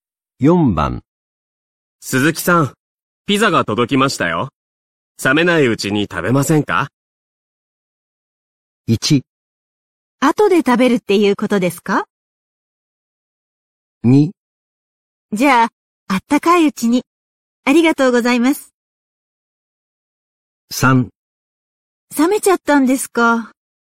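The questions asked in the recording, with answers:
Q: 鈴木さん、ピザが届きましたよ。冷めないうちに食べませんか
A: 2: じゃあ、あったかいうちに。ありがとうございます。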